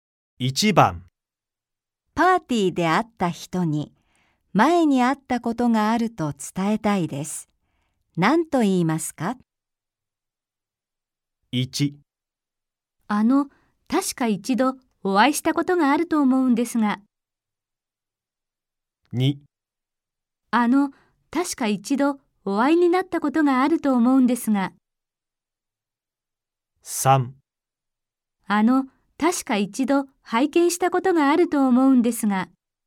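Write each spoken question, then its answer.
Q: パーティーで会った人に、前に会ったことがあると伝えたいです。 何と言いますか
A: 1: 確か一度お会いしたことがあると思うんですが。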